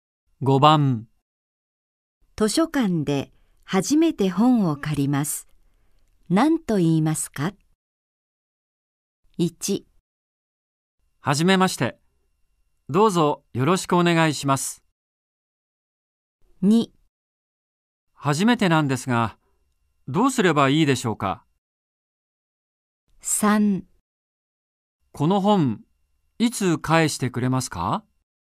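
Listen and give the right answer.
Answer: 2: 初めてなんですが、どうすればいいでしょうか?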